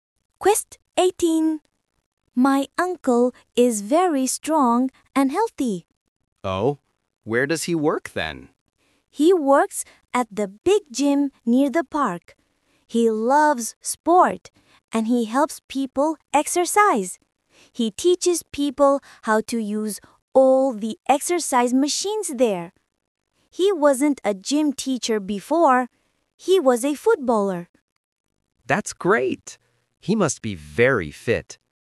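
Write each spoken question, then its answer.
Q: Oh, where does he work then?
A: At the big gym near the park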